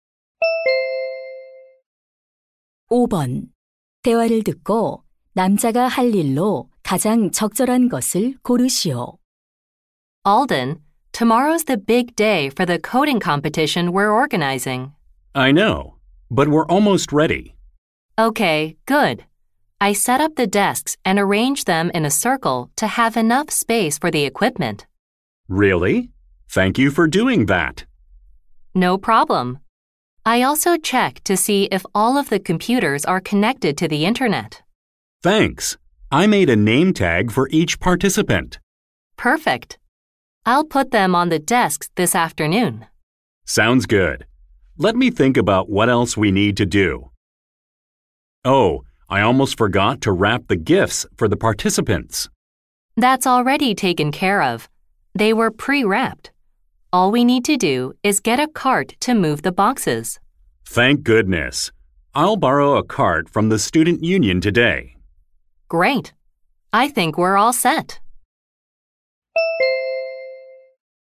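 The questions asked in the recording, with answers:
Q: 대화를 듣고 남자가 할 일로 가장 적절한 것을 고르시오.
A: 학생회에서 카트 빌리기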